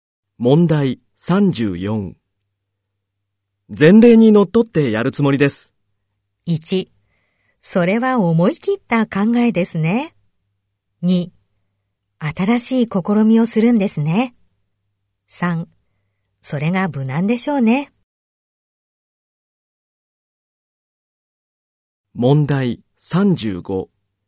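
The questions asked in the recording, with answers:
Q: 前例にのっとってやるつもりです。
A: 3: それが無難でしょうね。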